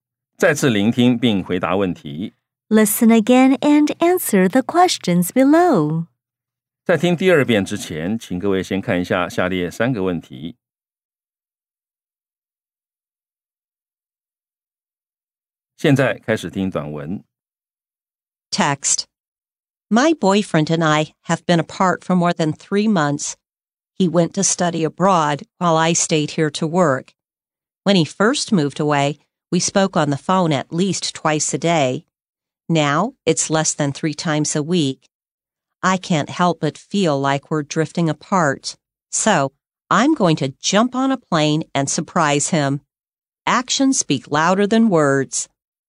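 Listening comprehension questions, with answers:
再次聆聽並回答問題 Listen again and answer the questions below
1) How long have the speaker and her boyfriend been apart?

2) Why did the speaker's boyfriend move away?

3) What will the speaker do?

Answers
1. More than three months.
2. To study abroad.
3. She will jump on a plane and surprise him.

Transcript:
My boyfriend and I have been apart for more than three months. He went to study abroad, while I stayed here to work. When he first moved away, we spoke on the phone at least twice a day. Now, it's less than three times a week. I can't help but feel like we're drifting apart. So, I'm going to jump on a plane and surprise him.

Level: 中階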